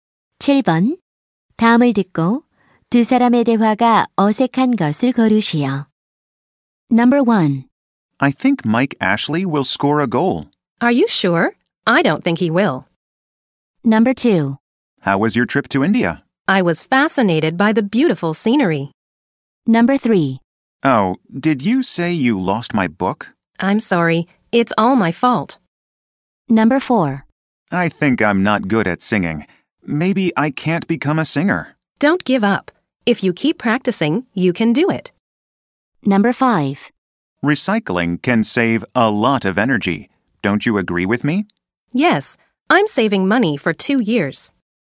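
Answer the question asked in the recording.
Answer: 5: Recycling can save a lot of energy. Don't you agree with me? / Yes, I'm saving money for 2 years.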